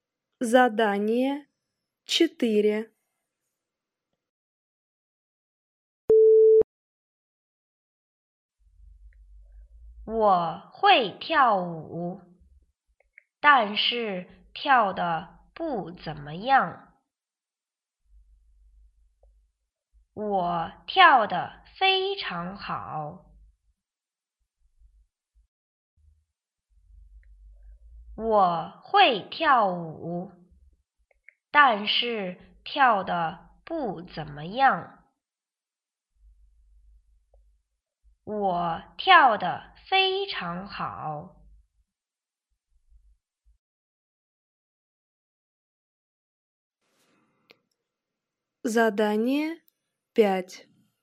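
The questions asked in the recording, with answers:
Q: 我跳得非常好。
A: 不对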